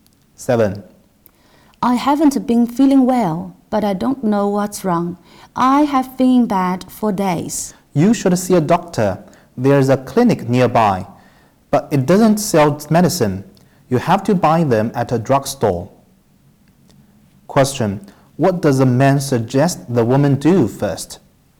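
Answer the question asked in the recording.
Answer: See a doctor at the clinic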